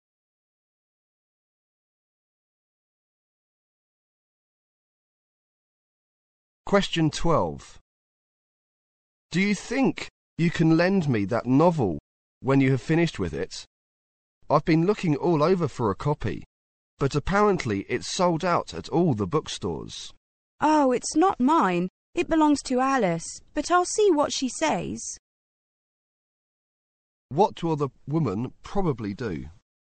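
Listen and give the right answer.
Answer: Ask Alice, who owns the novel, whether she can lend it.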